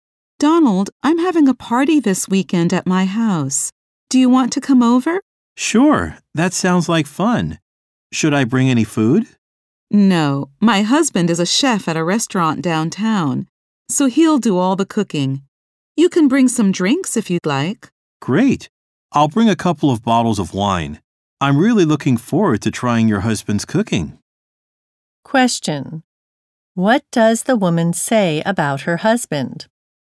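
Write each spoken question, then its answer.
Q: What does the woman say about her husband?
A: He is a chef at a restaurant downtown and will do all the cooking.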